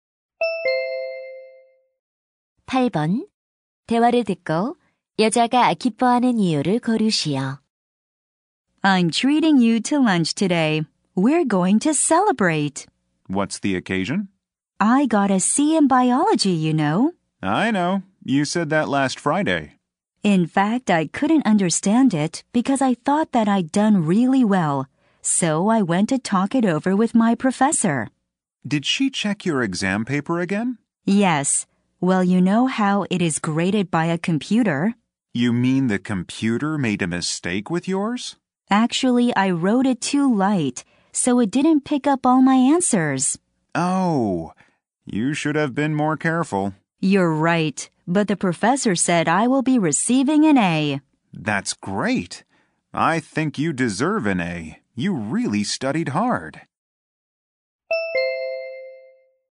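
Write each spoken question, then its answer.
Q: 대화를 듣고 여자가 기뻐하는 이유를 고르시오.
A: 생물학 성적이 C에서 A로 정정되어서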